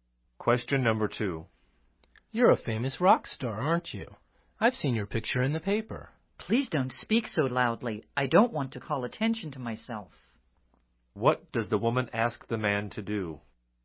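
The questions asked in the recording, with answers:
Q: What does the woman ask the man to do?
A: Speak more quietly so he doesn't draw attention to her.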